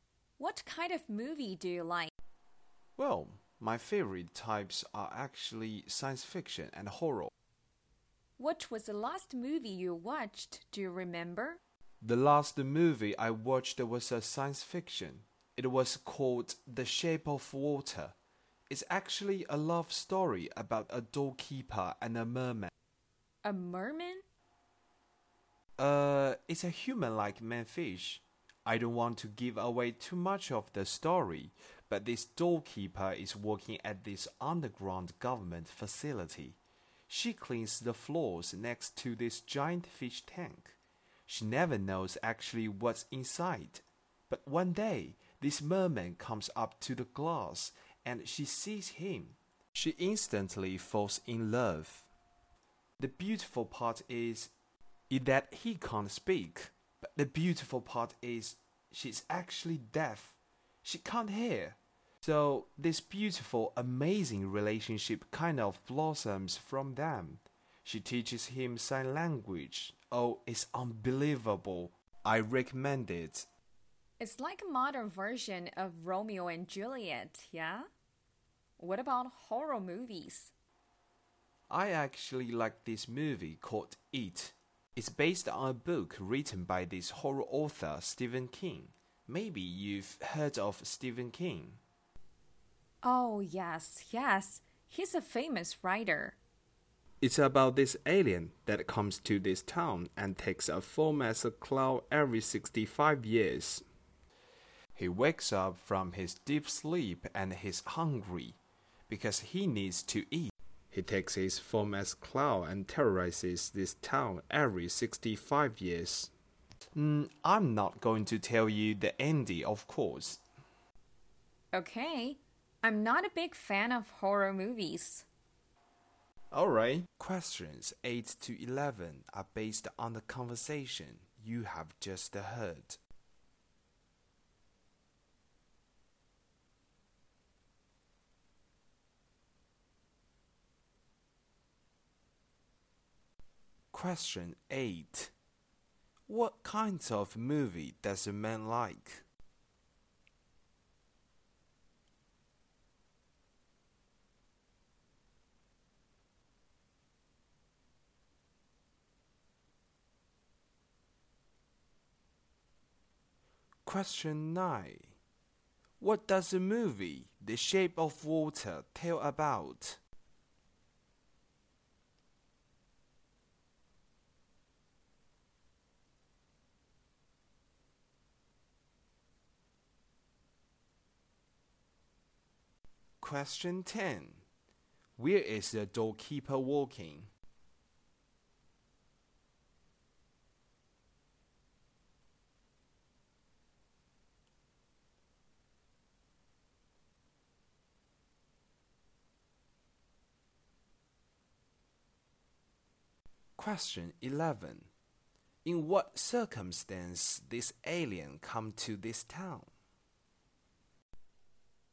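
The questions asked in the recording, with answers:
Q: What kinds of movie does a man like?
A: Science fiction and horror.

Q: What does the movie The Shape of Water tell about?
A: A love story between a doorkeeper and a merman.

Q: Where is the doorkeeper walking?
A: At an underground government facility.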